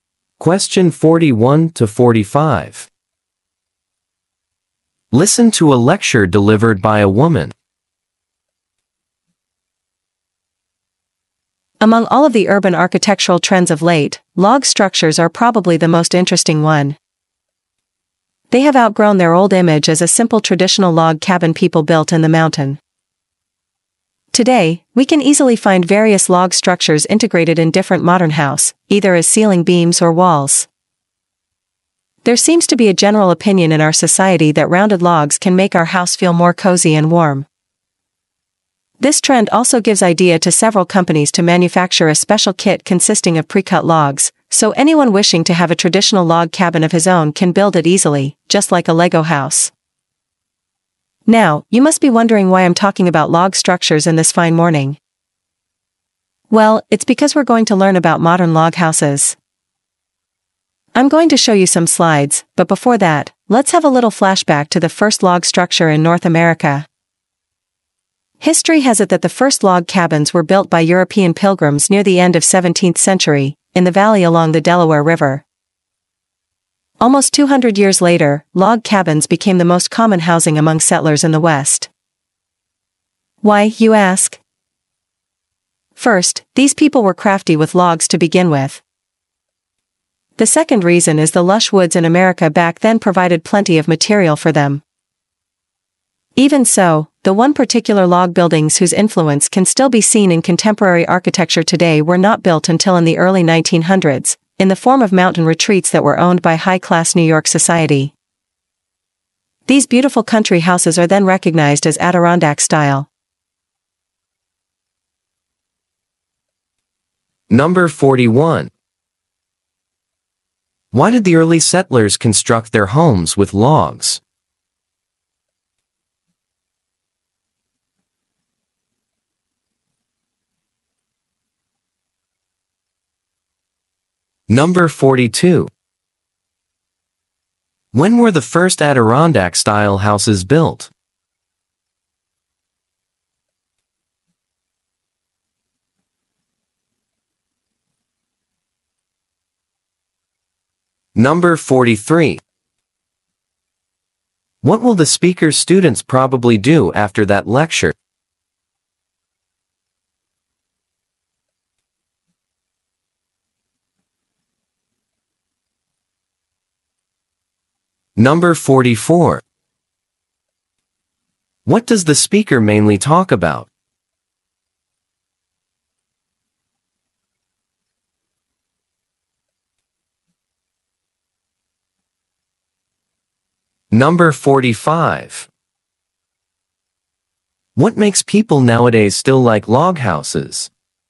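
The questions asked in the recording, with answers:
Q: Why did the early settlers construct their homes with logs?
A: They were skilled with logs and woods provided plenty of material

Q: When were the first Adirondack-style houses built?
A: In the early 1900s

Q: What makes people nowadays still like log houses?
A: Rounded logs make a house feel cozy and warm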